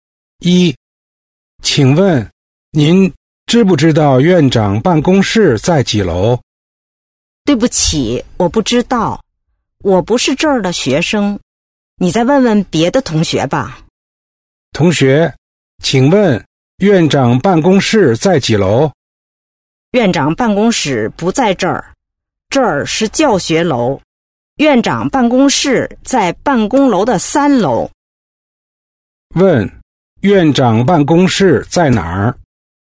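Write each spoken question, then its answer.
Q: 院长办公室在哪儿?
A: 在办公楼的三楼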